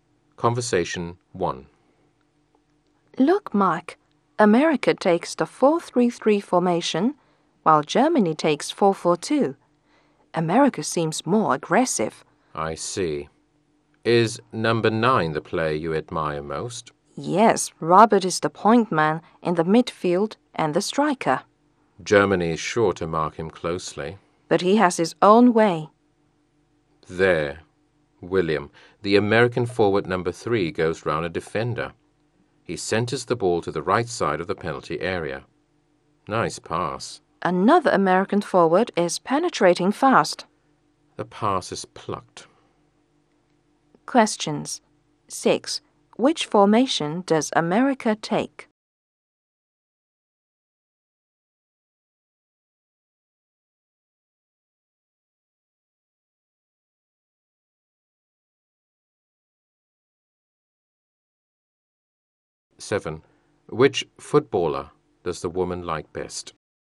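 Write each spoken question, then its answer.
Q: Which formation does America take?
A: 4-3-3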